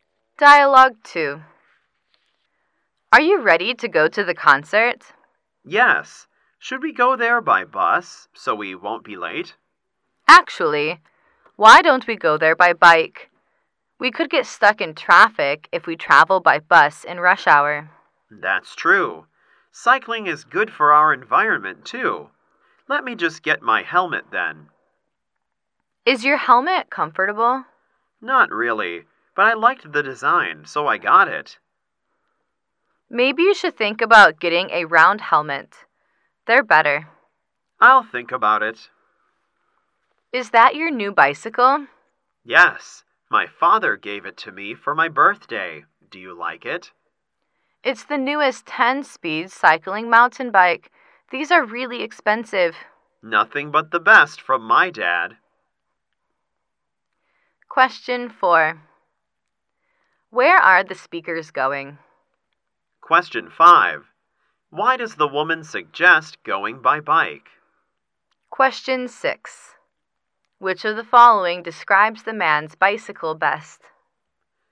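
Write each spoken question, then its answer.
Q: Where are the speakers going?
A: To a concert.

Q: Why does the woman suggest going by bike?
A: They could get stuck in rush-hour traffic on the bus.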